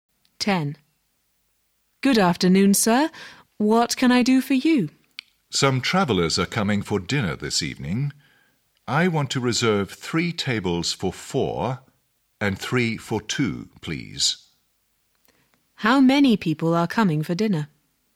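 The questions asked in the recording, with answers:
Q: How many people are coming for dinner?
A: 18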